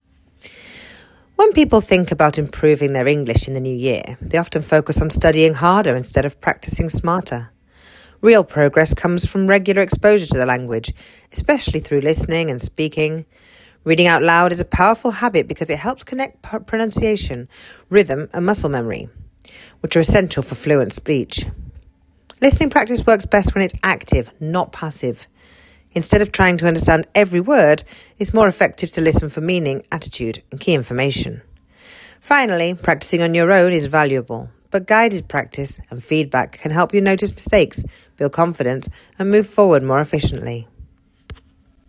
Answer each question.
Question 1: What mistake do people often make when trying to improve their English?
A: They often focus on studying harder instead of practising smarter.

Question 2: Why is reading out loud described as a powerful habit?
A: Because it connects pronunciation, rhythm and muscle memory, which are essential for fluent speech.

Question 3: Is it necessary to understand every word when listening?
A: No, it is not necessary to understand every word when listening.

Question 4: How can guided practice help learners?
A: Guided practice helps learners notice mistakes, build confidence and progress more efficiently.